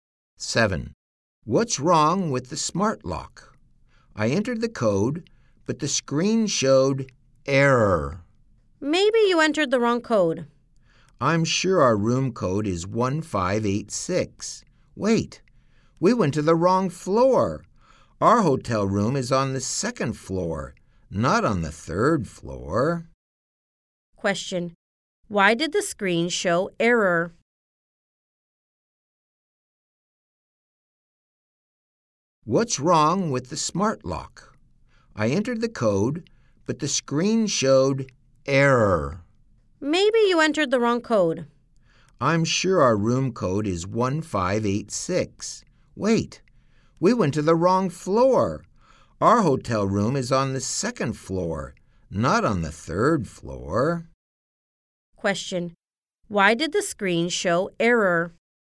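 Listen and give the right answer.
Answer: They went to the wrong floor.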